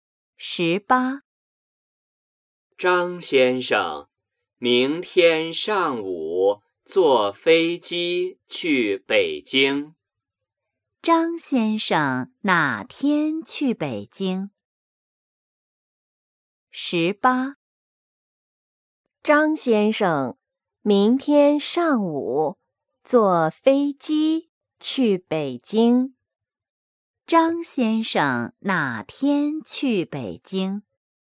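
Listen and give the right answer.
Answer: 明天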